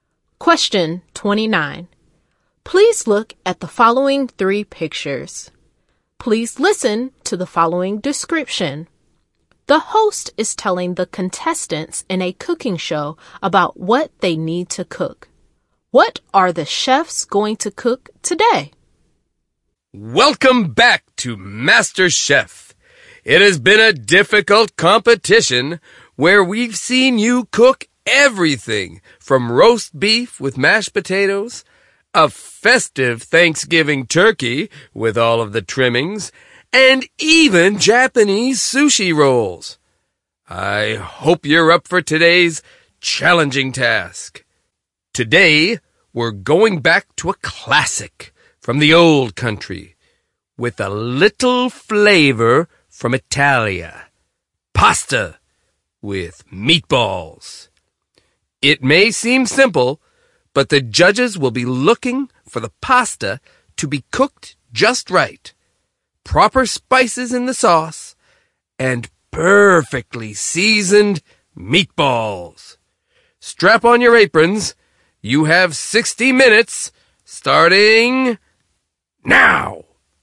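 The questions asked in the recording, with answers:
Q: What are the chefs going to cook today?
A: Pasta with meatballs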